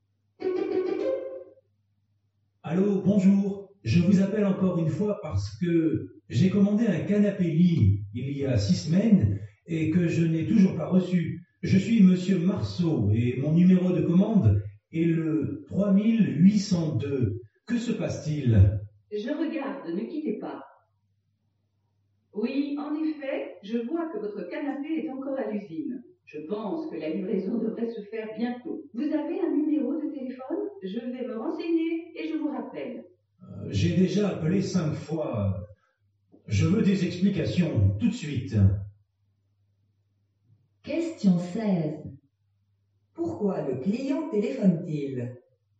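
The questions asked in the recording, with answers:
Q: Pourquoi le client téléphone-t-il ?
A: Parce qu'il n'a toujours pas reçu son canapé-lit commandé.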